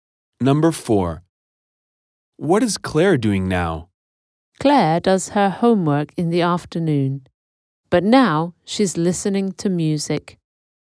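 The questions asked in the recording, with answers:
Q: What is Claire doing now?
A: Listening to music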